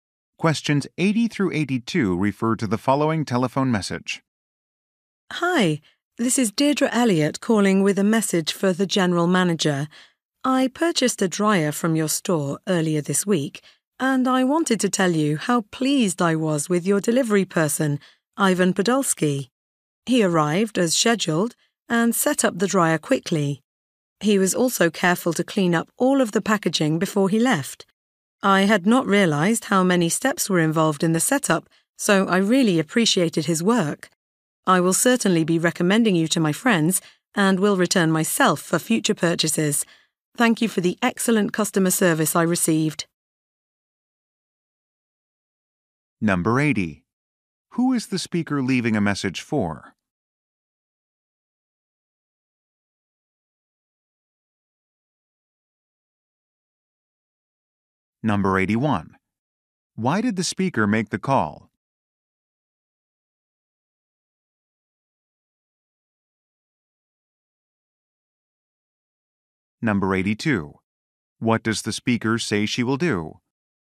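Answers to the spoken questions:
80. The general manager
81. To praise a delivery person
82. Recommend the store to friends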